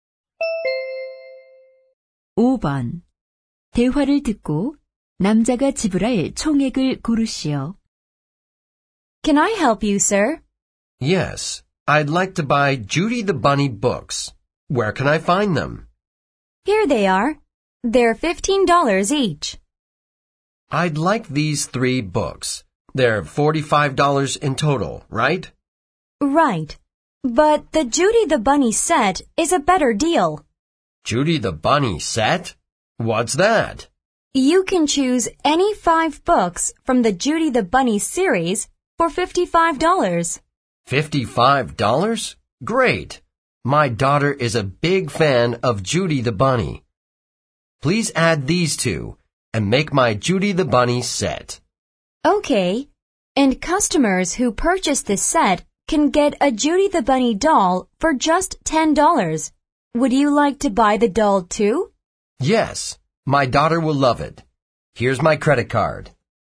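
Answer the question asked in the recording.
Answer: $65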